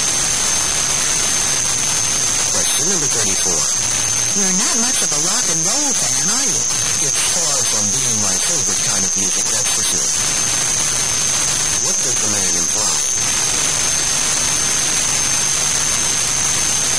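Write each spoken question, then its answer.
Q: What does the man imply?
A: He doesn't like rock and roll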